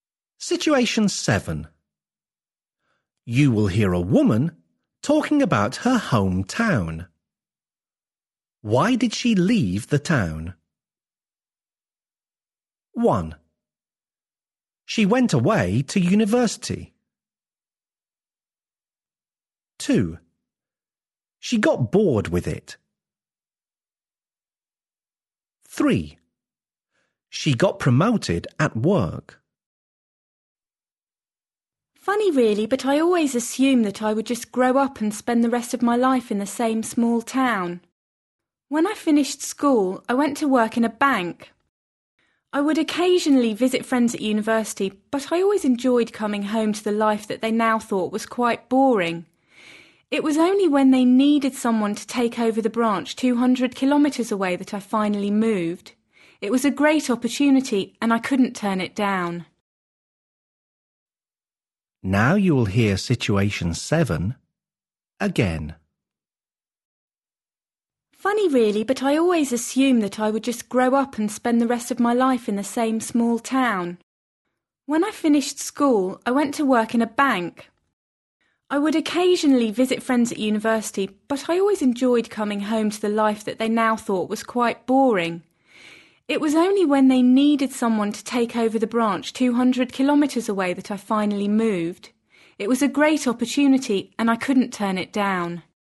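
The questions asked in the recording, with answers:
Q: Why did she leave the town?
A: 3: She got promoted at work.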